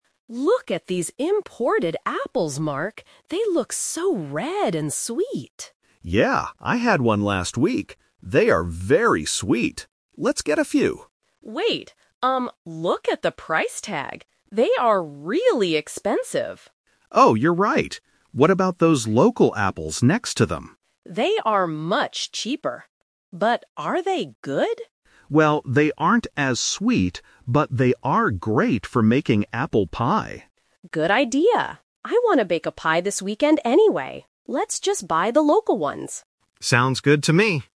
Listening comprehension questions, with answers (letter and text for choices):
Listen to the conversation and choose the correct answer (A, B, or C).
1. What does Mark say about the imported apples?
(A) They are great for making pie.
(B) They are very sweet.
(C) They are much cheaper.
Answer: (B) They are very sweet.

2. What is the problem with the imported apples?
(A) They are too expensive.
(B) They do not look fresh.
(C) They are not sweet enough.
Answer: (A) They are too expensive.

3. Which apples do they decide to buy?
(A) The imported apples, because they are sweet.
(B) The local apples, because Lisa wants to bake a pie.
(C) They decide not to buy any apples today.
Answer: (B) The local apples, because Lisa wants to bake a pie.

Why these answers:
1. Mark says he had an imported apple last week and "They are very sweet." Option A is a trap (the local apples are great for making pie). Option C is also a trap (the local apples are much cheaper).
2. Lisa looks at the price tag and says, "They are really expensive!" Option B is not mentioned in the audio. Option C is a trap because the audio says the imported apples are sweet, while the local ones are not as sweet.
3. This uses the "Twist" technique. They initially plan to get the imported apples, but change their minds when they see the high price. They decide to buy the local ones instead to make a pie. Option A is the main trap (what they planned to do at first). Option C is incorrect.

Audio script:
Lisa: Look at these imported apples, Mark. They look so red and sweet.
Mark: Yeah, I had one last week. They are very sweet. Let's get a few.
Lisa: Wait, um, look at the price tag. They are really expensive!
Mark: Oh, you're right. What about those local apples next to them?
Lisa: They are much cheaper. But are they good?
Mark: Well, they aren't as sweet, but they are great for making apple pie.
Lisa: Good idea! I want to bake a pie this weekend anyway. Let's just buy the local ones.